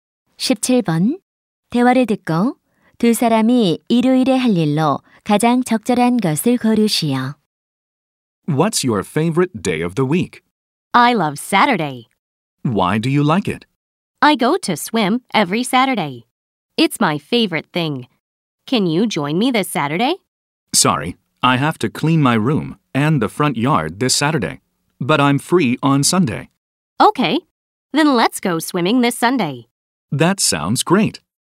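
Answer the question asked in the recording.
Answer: 수영하기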